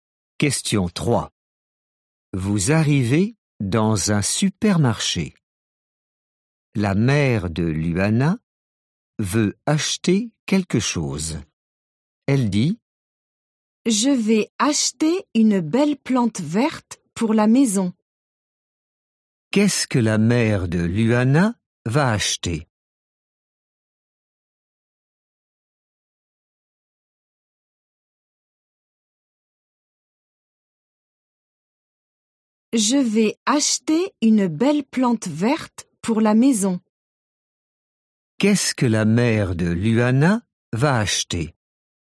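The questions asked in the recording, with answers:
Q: Qu'est-ce que la mère de Luana va acheter?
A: Une plante verte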